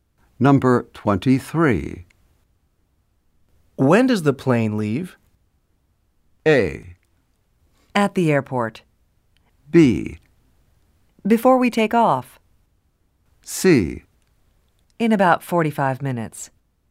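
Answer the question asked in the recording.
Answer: C: In about 45 minutes.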